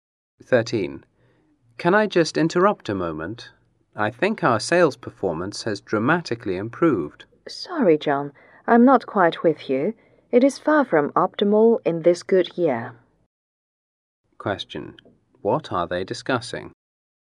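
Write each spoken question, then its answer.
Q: What are they discussing?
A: Their sales performance.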